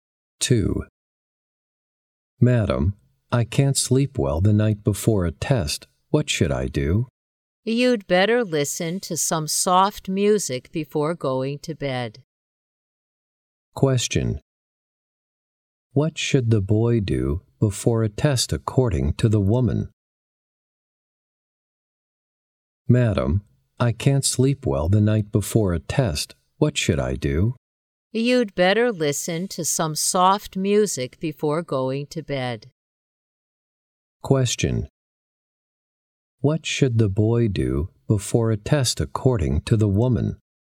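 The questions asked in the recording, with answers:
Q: What should the boy do before a test according to the woman?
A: Listen to some soft music before going to bed.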